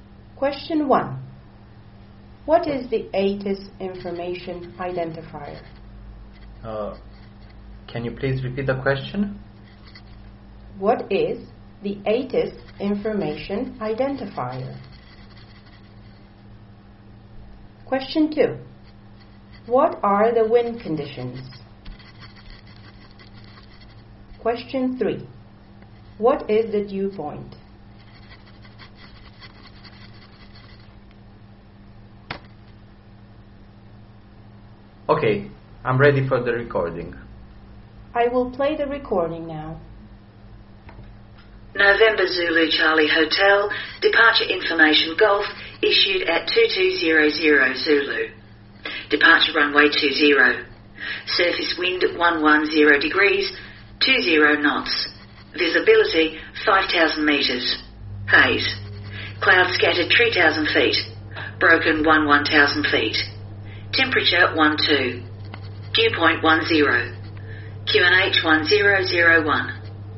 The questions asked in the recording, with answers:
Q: What is the ATIS information identifier?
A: ATIS information identifier is Golf.

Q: What are the wind conditions?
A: Wind conditions are 110 degrees, 20 knots.

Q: What is the dew point?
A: Dew point is plus 10 degrees.